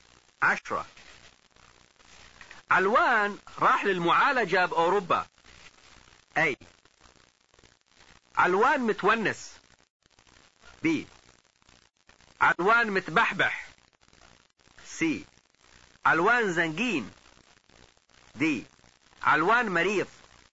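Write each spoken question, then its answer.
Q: علوان راح للمعالجة بأوروبا.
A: دي: علوان مريض.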